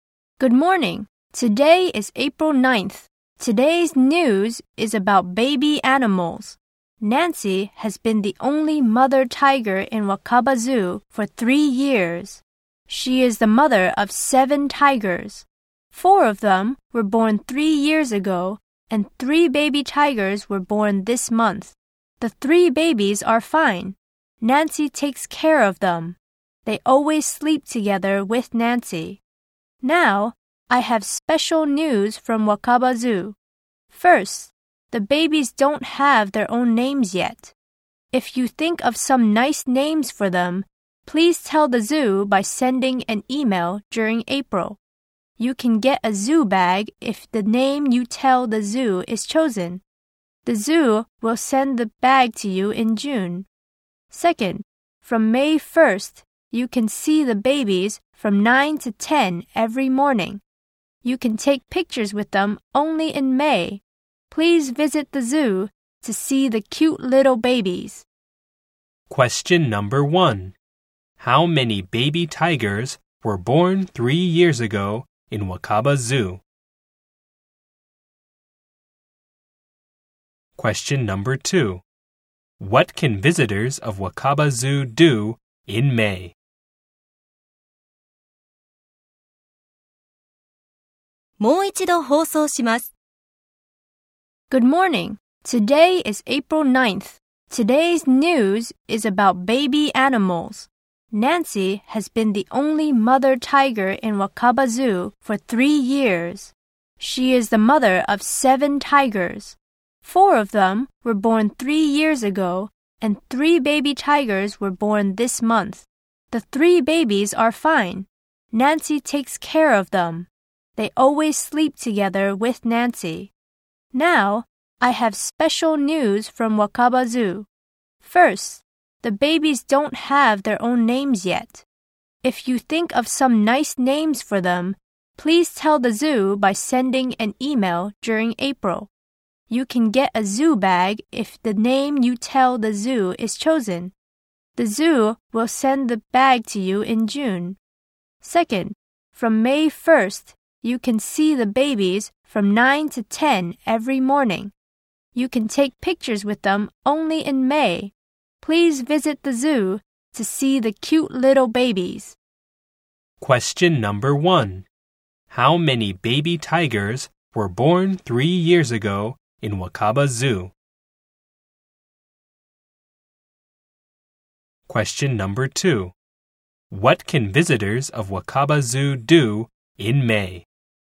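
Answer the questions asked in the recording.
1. Four
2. Take pictures with the baby tigers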